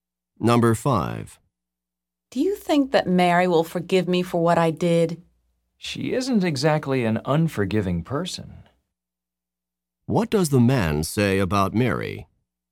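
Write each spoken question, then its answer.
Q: What does the man say about Mary?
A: She is a forgiving person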